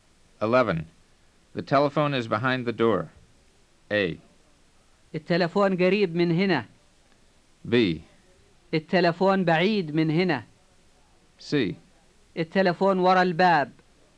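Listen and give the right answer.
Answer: C: التلفون وراء الباب.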